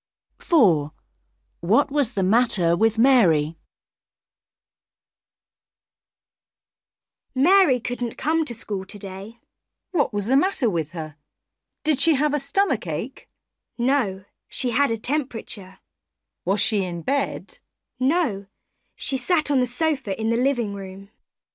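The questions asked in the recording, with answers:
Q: What was the matter with Mary?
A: she had a temperature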